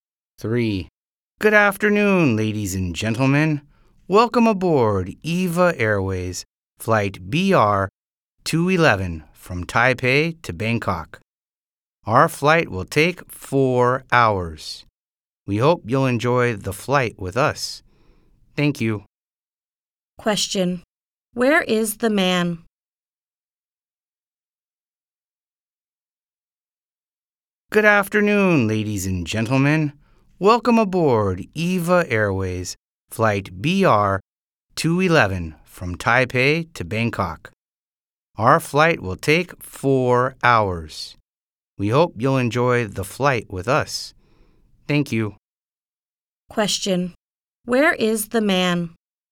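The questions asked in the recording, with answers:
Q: Where is the man?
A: On a plane (EVA Airways flight to Bangkok)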